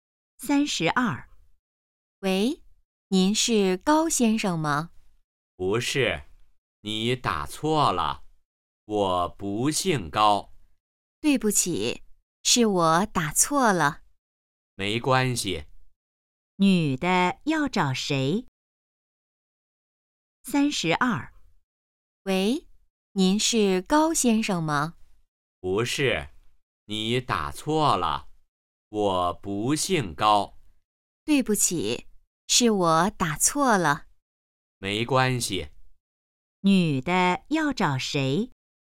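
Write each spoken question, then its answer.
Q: 女的要找谁?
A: 高先生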